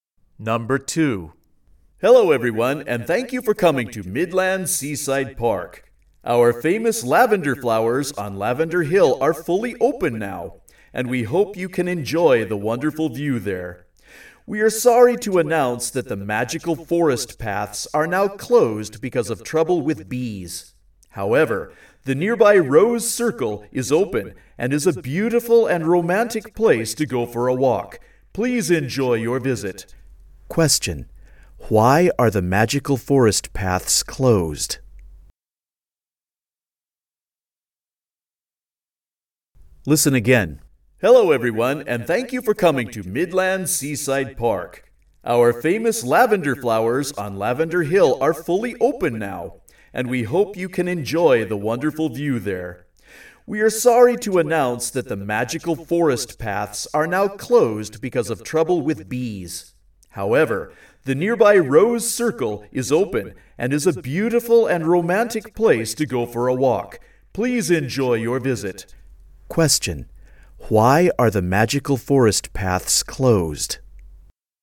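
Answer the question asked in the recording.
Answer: Because of trouble with bees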